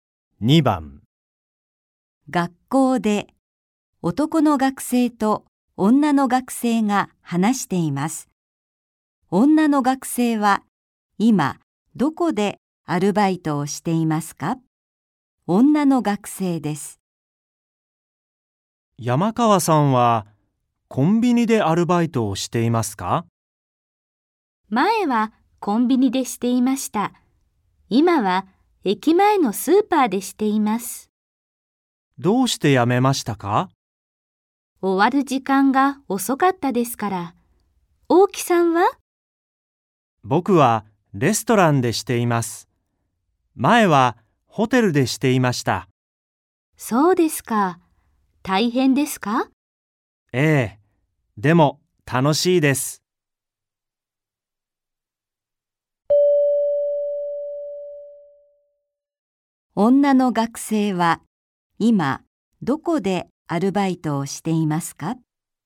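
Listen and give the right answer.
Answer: 駅前のスーパー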